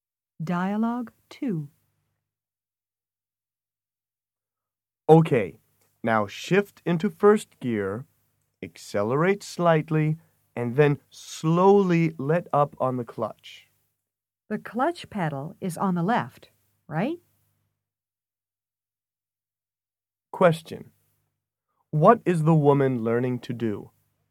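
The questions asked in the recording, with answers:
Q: What is the woman learning to do?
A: To drive a car with a manual transmission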